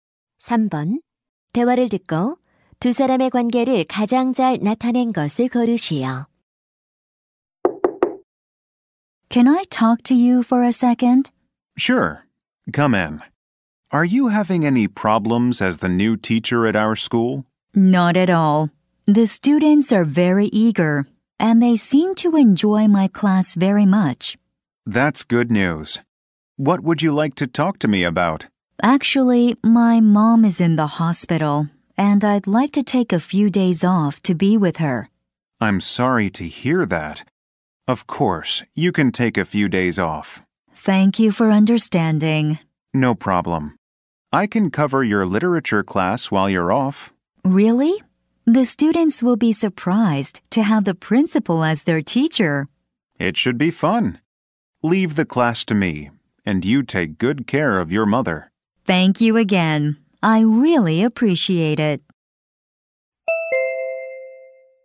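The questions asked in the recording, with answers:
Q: 대화를 듣고 두 사람의 관계를 가장 잘 나타낸 것을 고르시오.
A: 신임 교사와 교장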